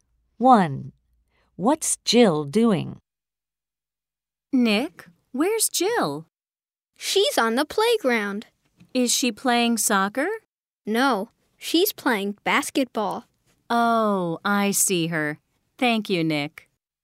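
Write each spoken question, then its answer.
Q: What's Jill doing?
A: Playing basketball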